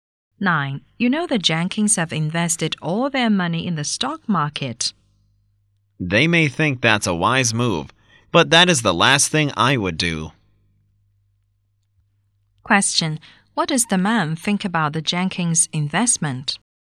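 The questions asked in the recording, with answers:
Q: What does the man think about the Jenkins investment?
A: It is unwise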